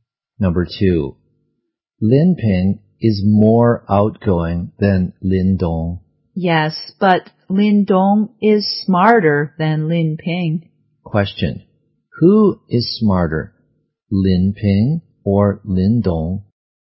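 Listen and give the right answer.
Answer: Lin Dong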